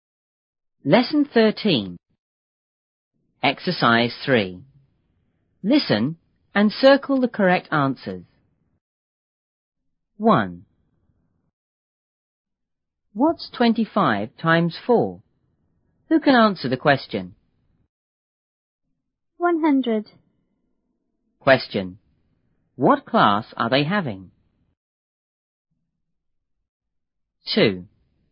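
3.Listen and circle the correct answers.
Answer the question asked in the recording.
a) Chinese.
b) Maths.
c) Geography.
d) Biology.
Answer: b) Maths.

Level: 初中英语广州版1B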